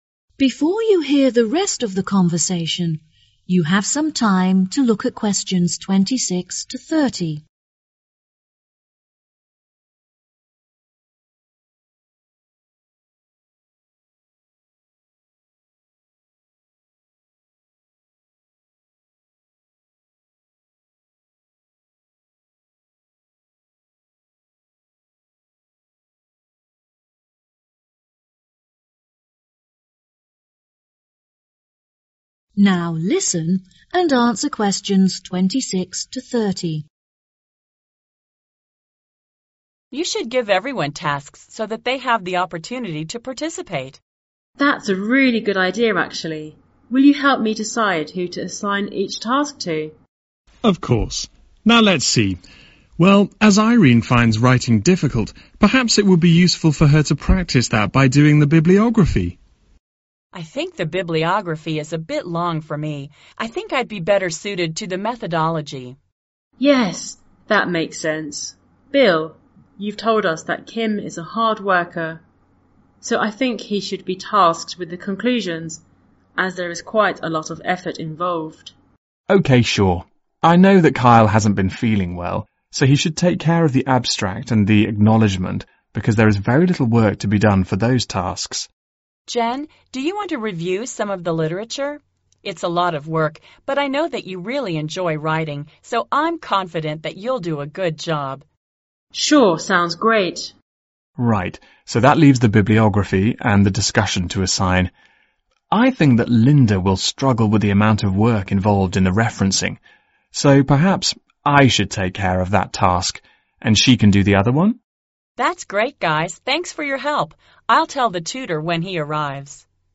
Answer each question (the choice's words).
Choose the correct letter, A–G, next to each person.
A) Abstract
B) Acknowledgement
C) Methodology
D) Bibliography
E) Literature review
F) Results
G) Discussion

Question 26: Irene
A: Methodology

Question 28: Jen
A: Literature review

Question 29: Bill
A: Bibliography